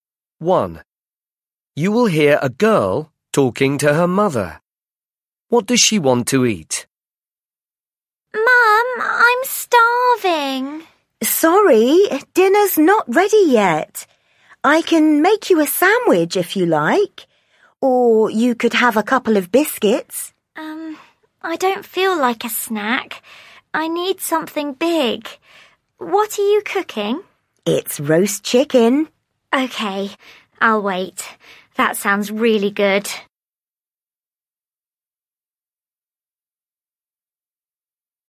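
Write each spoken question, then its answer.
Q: What does she want to eat?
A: roast chicken (dinner)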